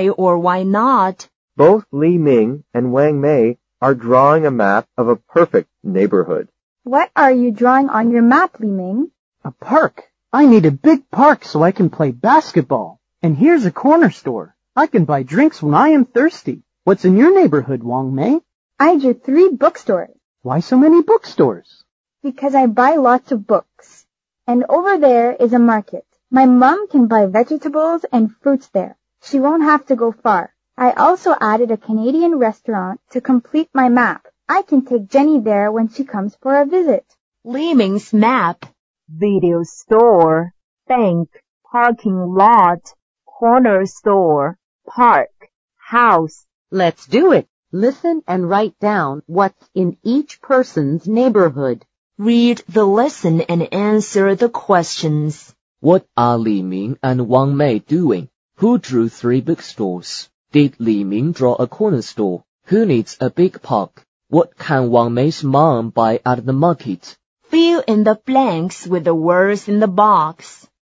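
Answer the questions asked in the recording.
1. Drawing a map of a perfect neighborhood.
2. Wang Mei
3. Yes, he did.
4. Li Ming
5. Vegetables and fruits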